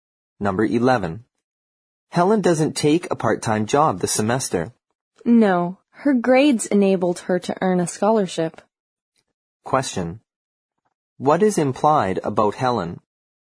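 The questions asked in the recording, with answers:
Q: What is implied about Helen?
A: She has a scholarship, so she doesn't need a part-time job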